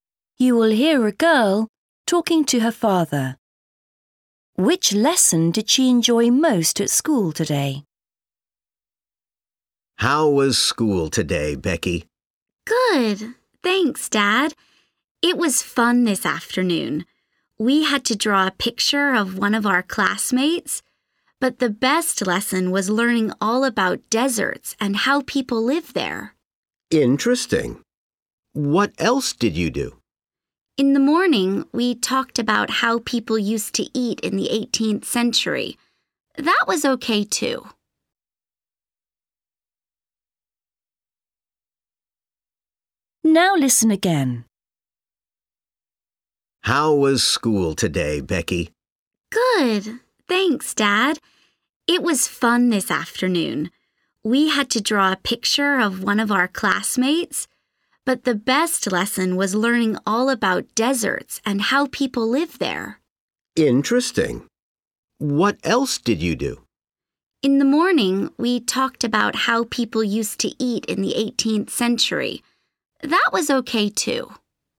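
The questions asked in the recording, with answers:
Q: Which lesson did she enjoy most at school today?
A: Geography – learning about deserts and how people live there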